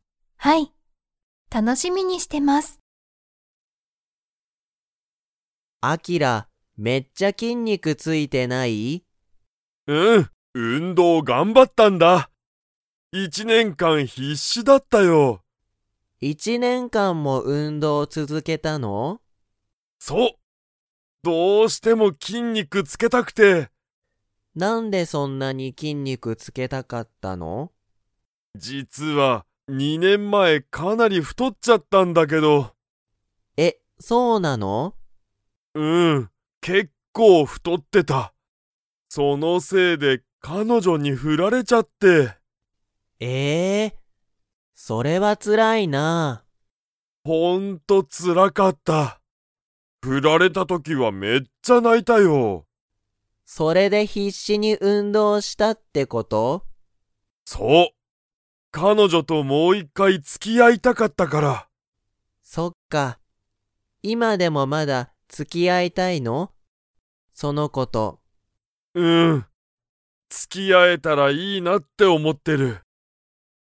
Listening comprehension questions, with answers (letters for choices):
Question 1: アキラは、いつ太ふとりましたか?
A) 一年前いちねんまえ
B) 二年前にねんまえ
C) 三年前さんねんまえ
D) 四年前よねんまえ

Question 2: アキラは、彼女かのじょと 。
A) まだ付つき合あいたい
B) もう付つき合あいたくない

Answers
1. B
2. A

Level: Level 4